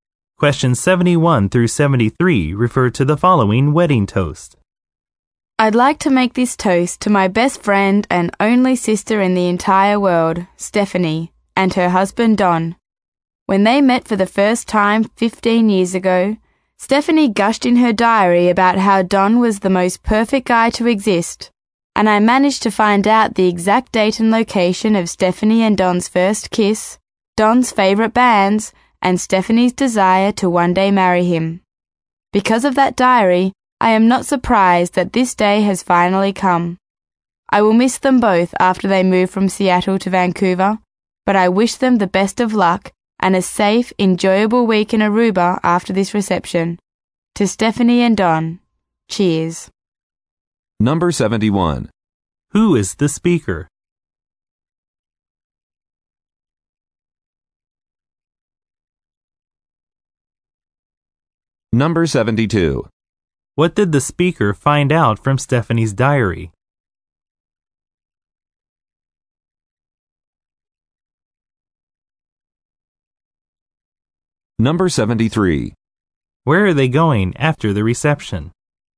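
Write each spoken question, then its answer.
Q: Who is the speaker?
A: The bride's sister (Stephanie's sister)

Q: What did the speaker find out from Stephanie's diary?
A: The date and location of their first kiss, Don's favorite bands, and Stephanie's wish to marry him

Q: Where are they going after the reception?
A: Aruba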